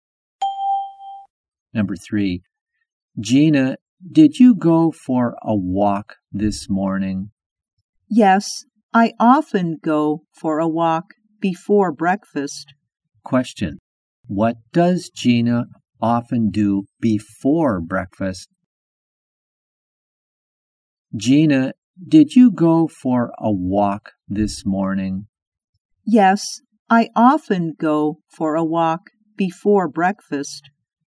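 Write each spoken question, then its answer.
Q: What does Gina often do before breakfast?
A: She goes for a walk.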